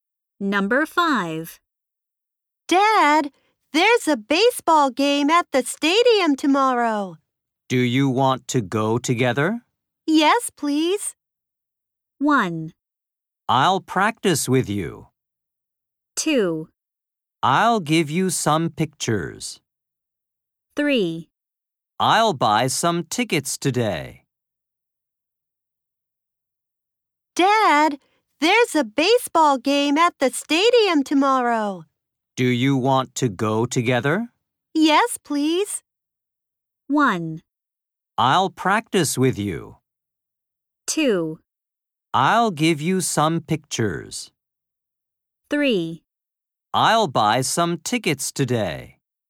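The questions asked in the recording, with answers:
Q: Yes, please.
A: 3: I'll buy some tickets today.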